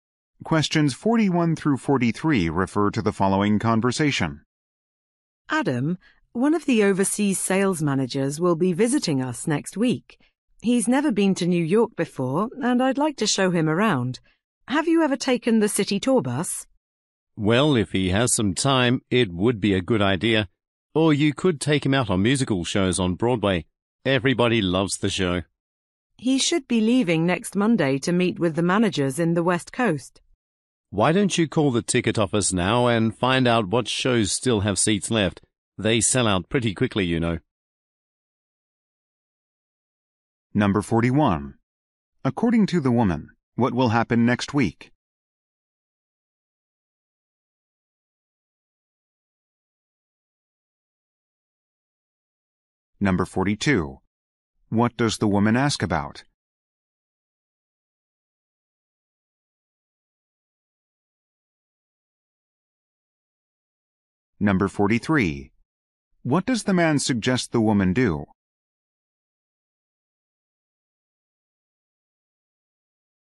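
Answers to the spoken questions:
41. An overseas sales manager will visit
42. The city tour bus
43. Call the ticket office about show seats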